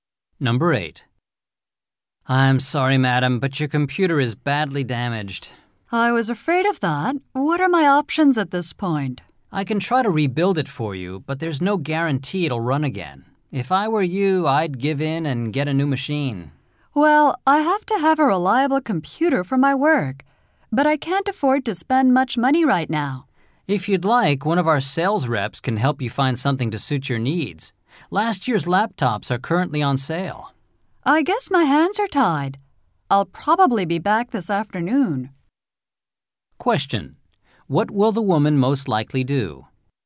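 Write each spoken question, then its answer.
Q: What will the woman most likely do?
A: Buy one of last year's laptops on sale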